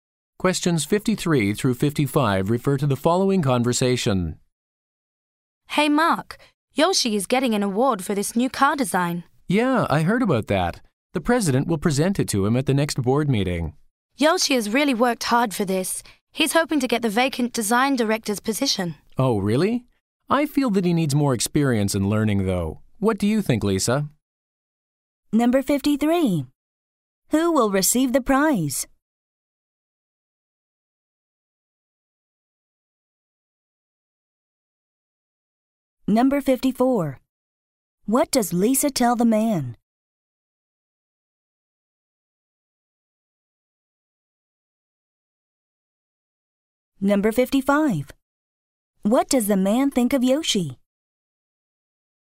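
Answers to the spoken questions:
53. Yoshi
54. Yoshi hopes to get the design director's position
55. He needs more experience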